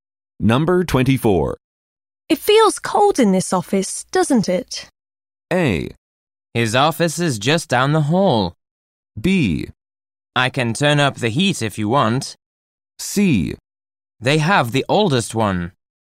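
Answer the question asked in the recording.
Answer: B: I can turn up the heat if you want.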